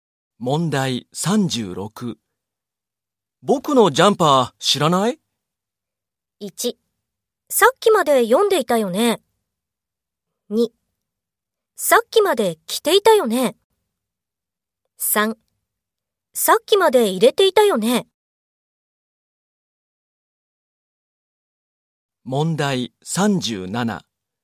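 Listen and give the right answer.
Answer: 2: さっきまで着ていたよね。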